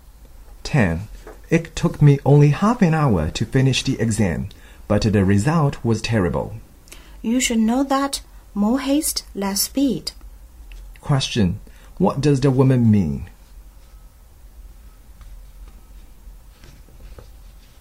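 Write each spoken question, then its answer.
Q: What does the woman mean?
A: He did the exam too hastily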